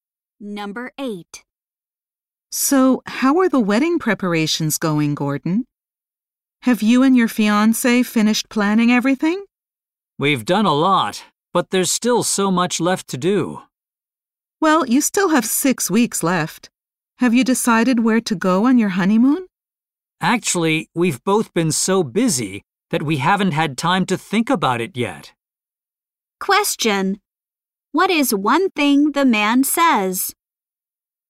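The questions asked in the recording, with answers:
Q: What is one thing the man says?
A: He has not had time to think about the honeymoon yet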